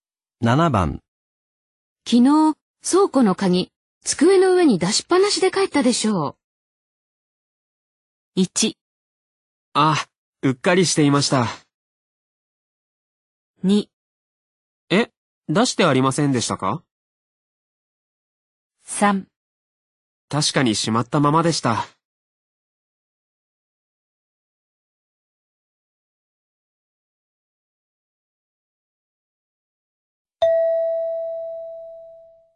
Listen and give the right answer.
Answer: 1

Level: N2 Listening · Test 12